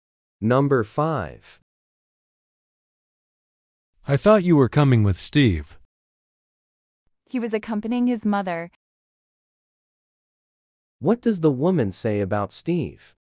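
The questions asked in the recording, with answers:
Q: What does the woman say about Steve?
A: He was with his mother.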